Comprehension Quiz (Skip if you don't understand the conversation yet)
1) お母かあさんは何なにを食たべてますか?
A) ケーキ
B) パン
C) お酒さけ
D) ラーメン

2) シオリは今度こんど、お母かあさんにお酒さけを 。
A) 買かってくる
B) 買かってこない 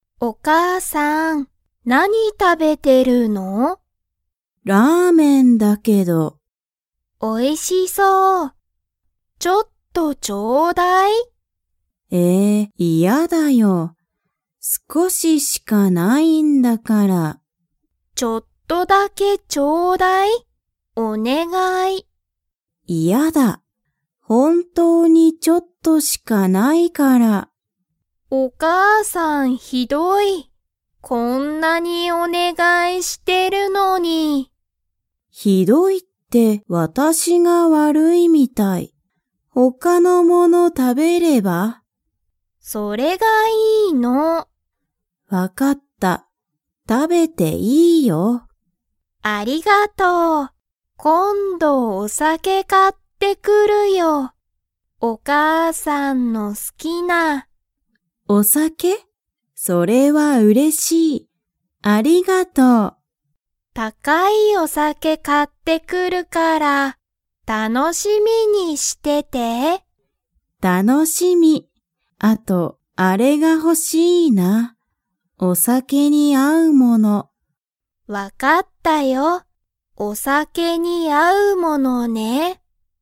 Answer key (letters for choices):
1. D
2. A

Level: Level 3